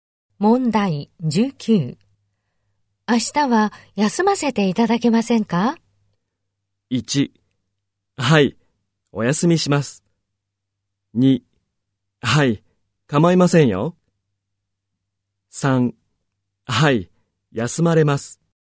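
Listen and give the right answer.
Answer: 2: はい、構いませんよ。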